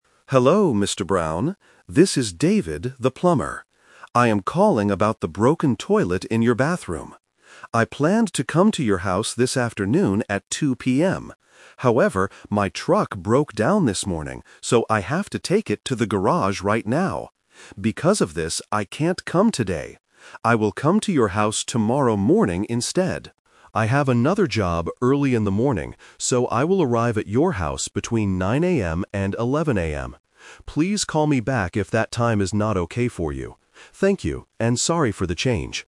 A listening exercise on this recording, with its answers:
Listen to the voicemail and choose the correct answer (A, B, or C).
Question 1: What does the plumber need to fix at Mr. Brown's house?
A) A broken truck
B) A broken toilet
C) A broken shower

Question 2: Why can't the plumber come today?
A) He has another job to do.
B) He has to take his truck to the garage.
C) He is feeling sick today.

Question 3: When will the plumber arrive at Mr. Brown's house?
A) Today at 2:00 PM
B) Tomorrow before 9:00 AM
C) Tomorrow between 9:00 AM and 11:00 AM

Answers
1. B) A broken toilet
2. B) He has to take his truck to the garage.
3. C) Tomorrow between 9:00 AM and 11:00 AM

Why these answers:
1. The plumber says, "I am calling about the broken toilet in your bathroom." Option (A) is a trap because he mentions his truck broke down, but that is his own problem, not what he needs to fix for the customer. Option (C) is a plausible bathroom problem, but it is not mentioned.
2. The plumber says, "my truck broke down this morning, so I have to take it to the garage." Option (A) is a trap because having another job is the reason he will come between 9 and 11 tomorrow, not the reason he cancels today. Option (C) is a plausible reason for a cancellation but is never mentioned.
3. He clearly states, "I will arrive at your house between 9:00 AM and 11:00 AM." Option (A) is a trap because 2:00 PM today was his original plan before the truck broke down. Option (B) is a trap because he has another job early in the morning before 9:00 AM.

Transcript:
Plumber (Voicemail): Hello, Mr. Brown. This is David, the plumber. I am calling about the broken toilet in your bathroom. I planned to come to your house this afternoon at 2:00 PM. However, my truck broke down this morning, so I have to take it to the garage right now. Because of this, I can't come today. I will come to your house tomorrow morning instead. I have another job early in the morning, so I will arrive at your house between 9:00 AM and 11:00 AM. Please call me back if that time is not okay for you. Thank you, and sorry for the change!

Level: A2

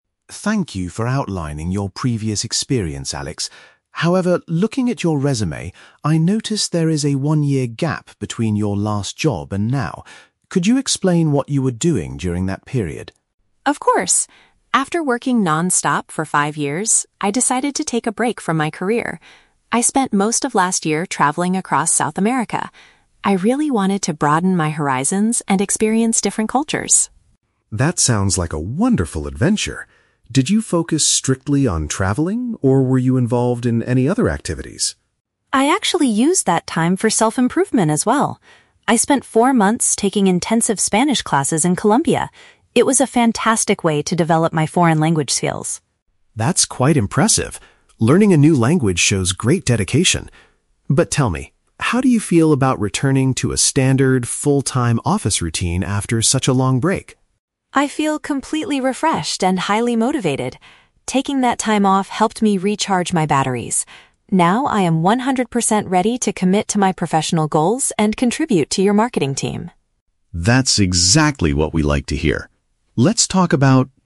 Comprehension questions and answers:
Listen to a job interview conversation between a hiring manager and a candidate. Choose the best answer (A, B, or C) for each question.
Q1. What is the primary reason Alex took a year off from his career?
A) To recover from a period of severe illness.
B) To explore foreign countries and learn about the world.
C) To help his family start a travel agency in South America.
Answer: B) To explore foreign countries and learn about the world.

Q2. How did Alex spend a significant portion of his gap year?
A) Working as a tour guide for international visitors.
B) Teaching English to students at a local school.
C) Studying to become fluent in another language.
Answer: C) Studying to become fluent in another language.

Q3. How does Alex feel about going back to a regular job now?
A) He is eager to return to work with fresh energy.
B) He is still feeling quite tired from his long journey.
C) He is uncertain if the office environment is right for him.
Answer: A) He is eager to return to work with fresh energy.

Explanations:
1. Alex explains that he spent the year "traveling across South America" to "broaden my horizons and experience different cultures." Paraphrasing: explore foreign countries = traveling across South America; learn about the world = broaden horizons/experience cultures.
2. Alex says he spent four months "taking intensive Spanish classes" to develop his "foreign language skills." Paraphrasing: intensive classes = studying; another language = Spanish/foreign language.
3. When asked about returning to a full-time routine, Alex says he feels "completely refreshed and highly motivated" and that he "recharged his batteries." Paraphrasing: eager = highly motivated; fresh energy = refreshed / recharged batteries.

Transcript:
Manager: Thank you for outlining your previous experience, Alex. However, looking at your resume, I noticed there is a one-year gap between your last job and now. Could you explain what you were doing during that period?
Alex: Of course. After working non-stop for five years, I decided to take a break from my career. I spent most of last year traveling across South America. I really wanted to broaden my horizons and experience different cultures.
Manager: That sounds like a wonderful adventure. Did you focus strictly on traveling, or were you involved in any other activities?
Alex: I actually used that time for self-improvement as well. I spent four months taking intensive Spanish classes in Colombia. It was a fantastic way to develop my foreign language skills.
Manager: That's quite impressive. Learning a new language shows great dedication. But tell me, how do you feel about returning to a standard, full-time office routine after such a long break?
Alex: I feel completely refreshed and highly motivated. Taking that time off helped me recharge my batteries. Now, I am one hundred percent ready to commit to my professional goals and contribute to your marketing team.

